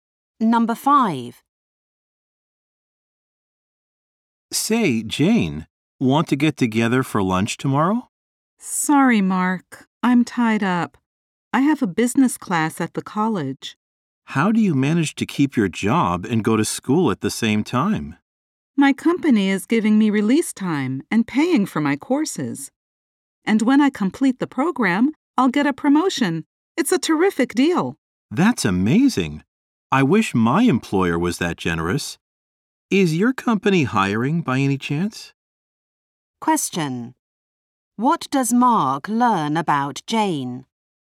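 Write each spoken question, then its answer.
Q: What does Mark learn about Jane?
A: Her company pays for her courses and will promote her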